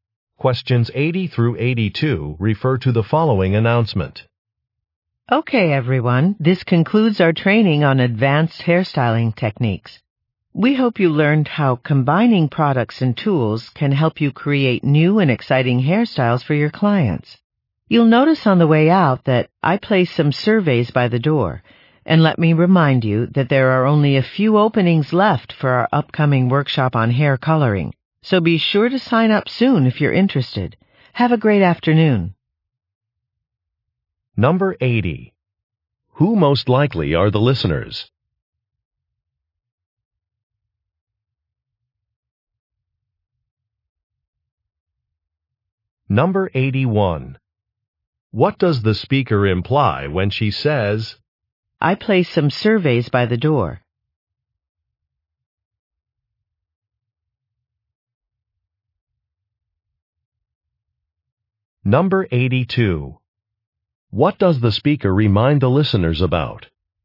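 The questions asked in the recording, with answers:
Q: Who most likely are the listeners?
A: Hairstylists

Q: What does the speaker remind the listeners about?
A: Only a few openings are left for the hair-coloring workshop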